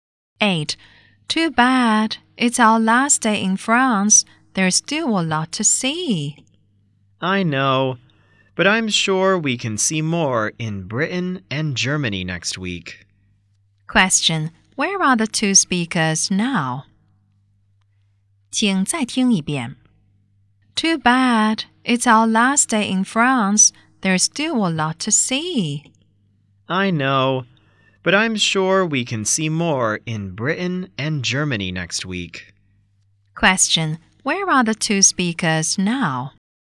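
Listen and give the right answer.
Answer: In France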